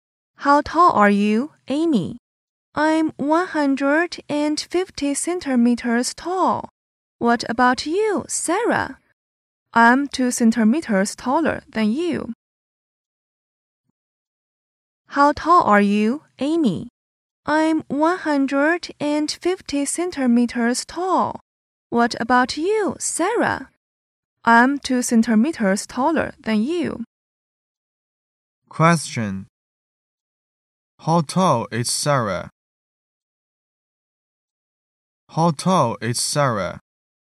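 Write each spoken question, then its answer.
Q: How tall is Sarah?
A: 152 centimeters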